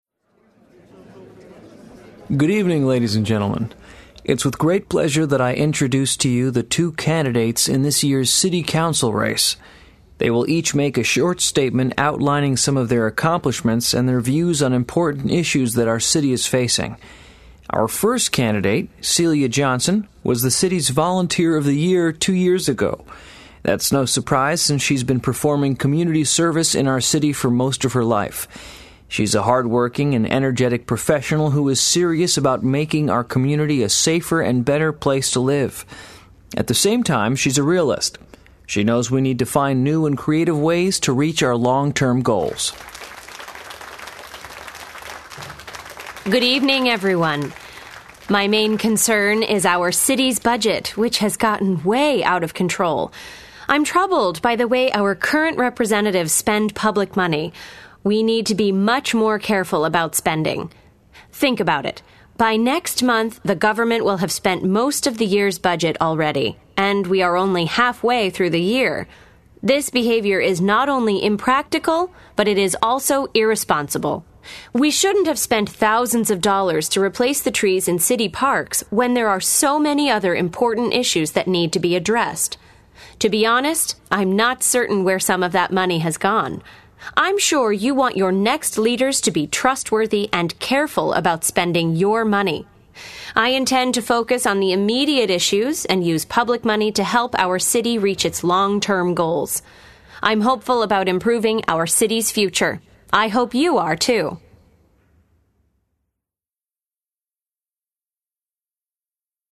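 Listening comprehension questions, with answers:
Listen to the conversation. Then choose all the correct answers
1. The host is introducing people who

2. According to the host, Celia Johnson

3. Celia Johnson believes that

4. What kind of financial problems is the city having, according to Celia Johnson?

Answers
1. are candidates in this year's city council race
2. was the city's Volunteer of the Year two years ago and is hardworking, energetic and a realist
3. the city's budget has gotten out of control and spending must be more careful
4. It has spent most of the year's budget halfway through the year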